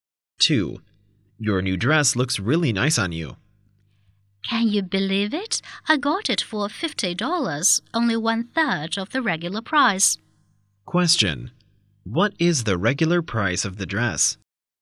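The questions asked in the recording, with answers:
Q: What is the regular price of the dress?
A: $150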